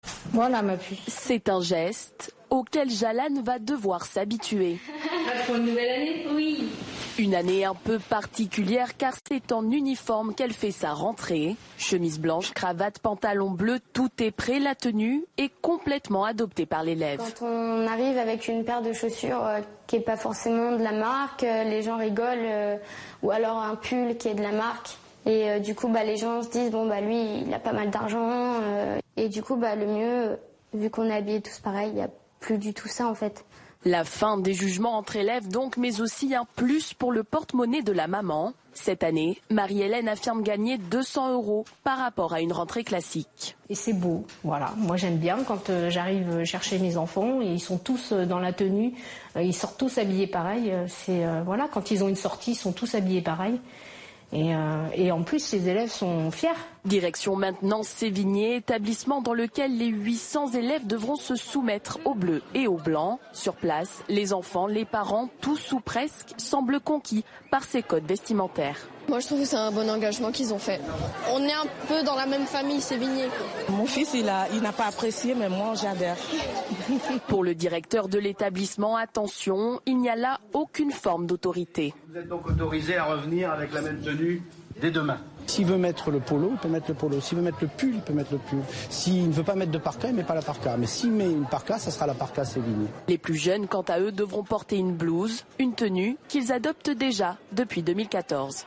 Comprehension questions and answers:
Regardez cette vidéo puis répondez aux questions :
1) Pourquoi la rentrée scolaire de cette année sera-t-elle particulière à l'école ?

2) Quels sont les vêtements qui composent l'uniforme ?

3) Quels sont les avantages de porter un uniforme (pour Jalann et sa mère) ?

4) Que pense sa mère de l'uniforme ?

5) Comment est l'avis général (élèves et parents) ?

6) Comment le directeur de l'établissement de Sévigné justifie-t-il son choix ?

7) Vrai ou faux : les élèves les plus jeunes n'ont pas de tenue. Justifiez.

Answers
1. Pour la première fois, cette rentrée se fait en uniforme.
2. Chemise blanche, cravate, pantalon bleu, polo, pull et parka.
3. Ça coûte moins cher (200 euros d'économie)
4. Elle est enthousiaste (c'est beau, pratique pour les sorties, les élèves sont fiers).
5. Ils sont presque tous conquis
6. Les élèves sont libres de porter ce qu'ils veulent tant que ce sont des vêtements de l'école.
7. faux

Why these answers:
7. Les plus jeunes portent déjà une blouse depuis 2014 .

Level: Niveaux : B1/B2